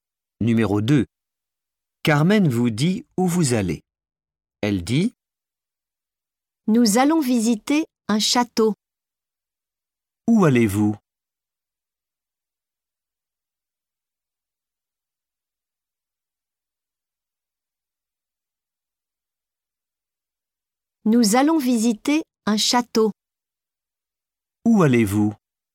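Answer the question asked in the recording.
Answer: Visiter un château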